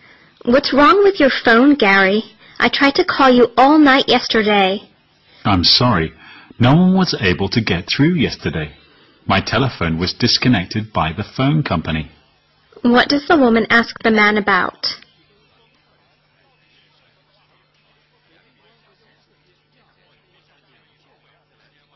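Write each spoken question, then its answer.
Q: What does the woman ask the man about?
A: Why she couldn't reach him by phone last night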